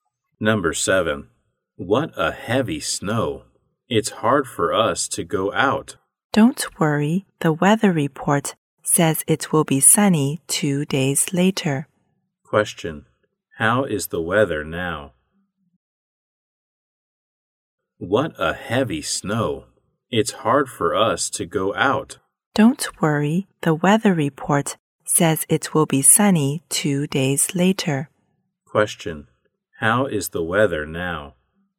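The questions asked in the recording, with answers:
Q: How is the weather now?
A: Snowy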